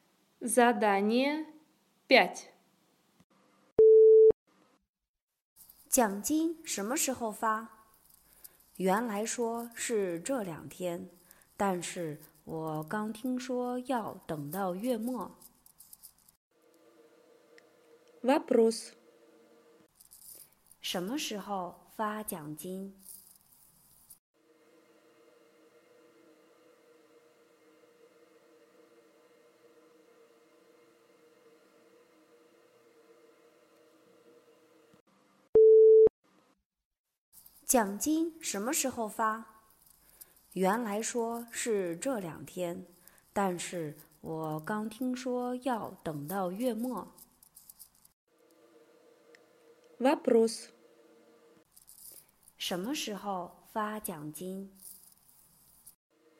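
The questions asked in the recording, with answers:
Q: 什么时候发奖金?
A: 月末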